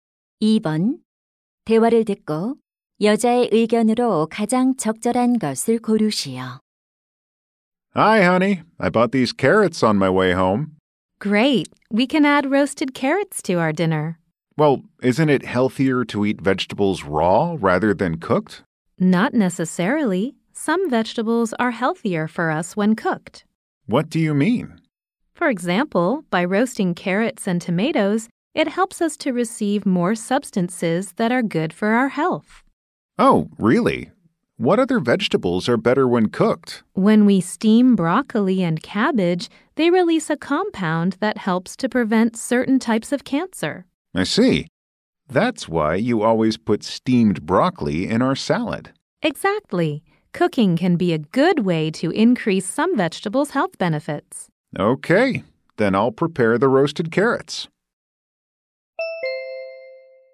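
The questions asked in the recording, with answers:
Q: 대화를 듣고 여자의 의견으로 가장 적절한 것을 고르시오.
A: 일부 채소는 익혀 먹으면 건강에 더 좋다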